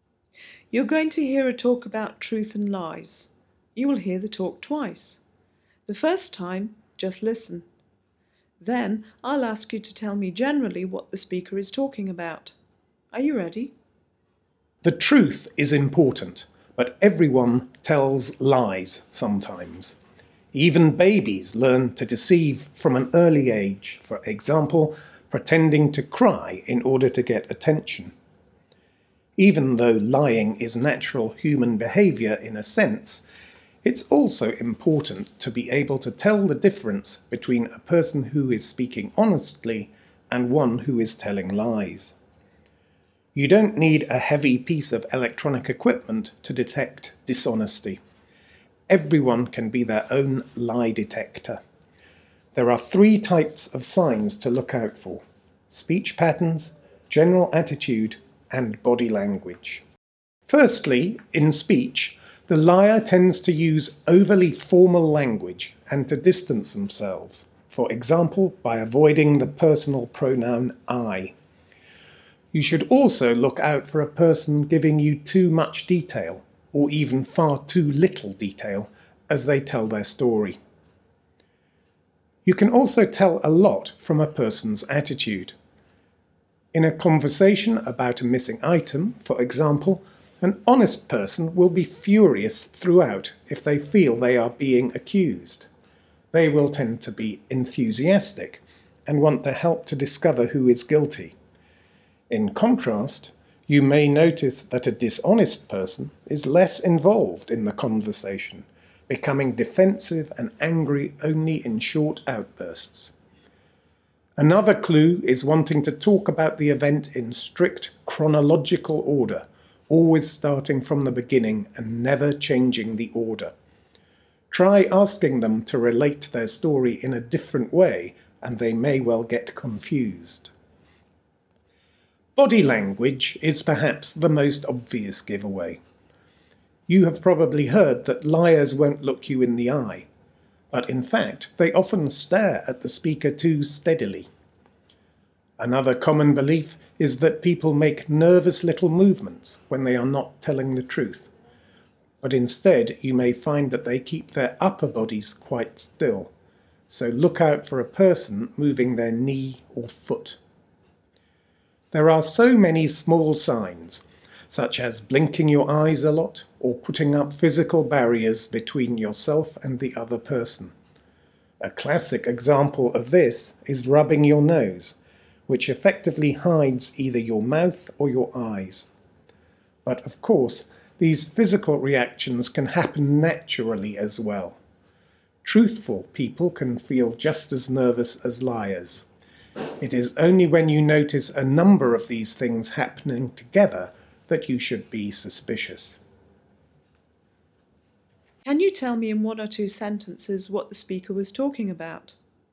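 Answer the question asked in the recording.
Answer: How to tell whether someone is lying, using signs in their speech, attitude and body language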